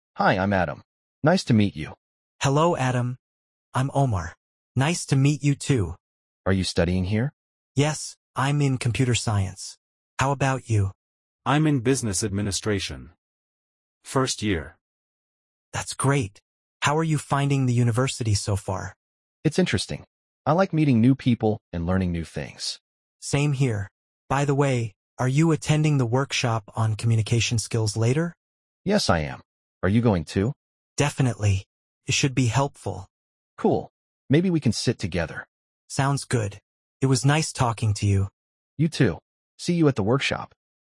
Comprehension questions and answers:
Complete the phrases as you listen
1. Hi, I'm Adam. ___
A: Nice to meet you!

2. Yes, I'm ______ Computer Science. How about you?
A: in

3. How are you finding the university ______ far?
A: so

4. I like meeting new people and ______ new things.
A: learning

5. Maybe we can sit ______.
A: together